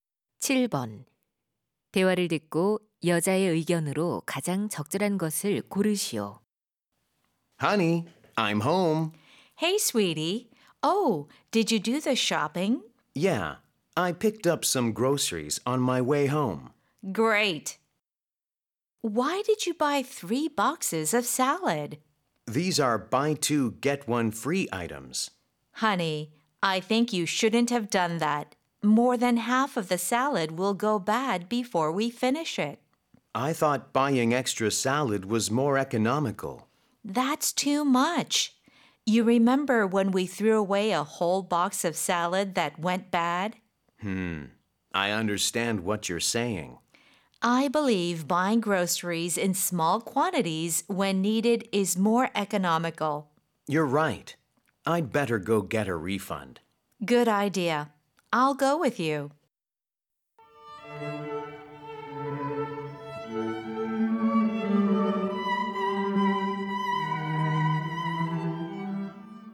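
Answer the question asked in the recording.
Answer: 식료품은 필요할 때 소량으로 사는 것이 더 경제적이다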